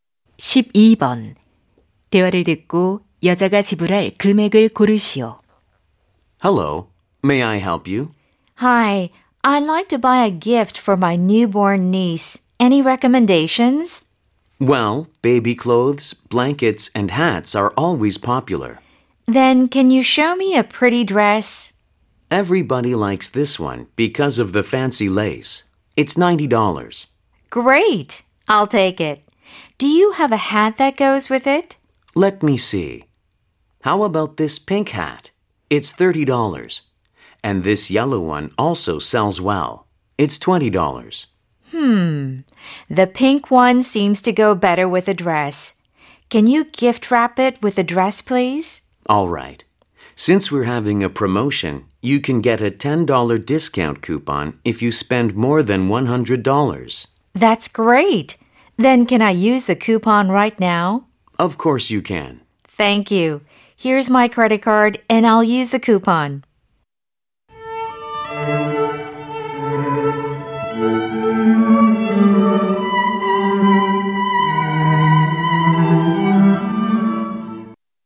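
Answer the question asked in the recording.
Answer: $110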